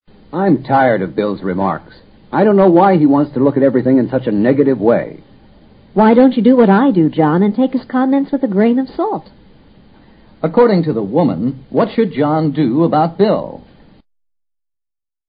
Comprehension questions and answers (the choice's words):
According to the woman, what should John do about Bill?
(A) John should not talk to Bill anymore.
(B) John should tell Bill not to think negatively.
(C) John should take Bill's remarks seriously.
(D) John should pay little attention to what Bill says.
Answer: John should pay little attention to what Bill says.

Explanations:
take his comments with a grain of salt 的意思是习语,作"有保留地"解。这是她的态度,她也让John采取这种态度。 pay little attention to what he says 是"不必介意他说些什么。"两种说法意思相近。A,B,C三种说法均与她的原义有别。 Remarks = what he says。 in a negative way: 消极地;持否定态度地。 take... seriously: 认真对待。